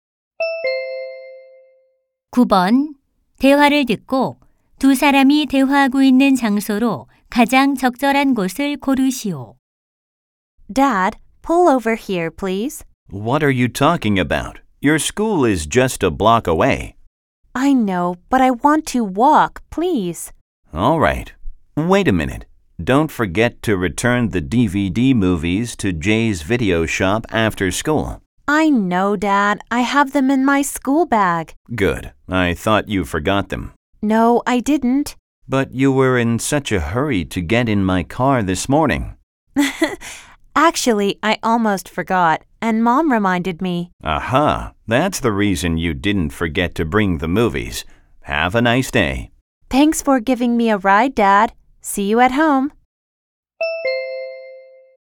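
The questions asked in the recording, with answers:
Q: 대화를 듣고 두 사람이 대화하고 있는 장소로 가장 적절한 곳을 고르시오.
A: 자동차 안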